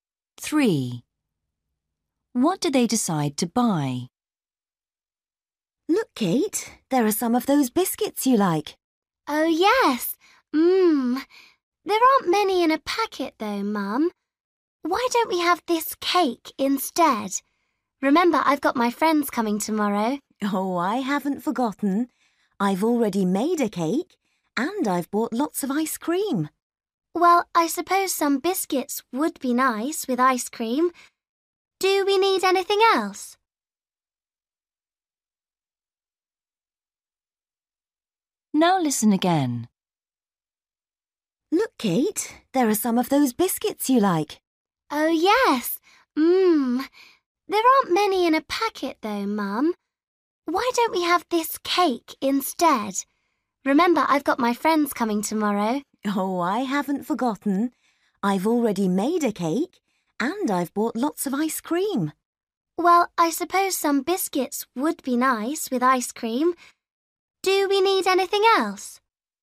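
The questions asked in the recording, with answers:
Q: What do they decide to buy?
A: Biscuits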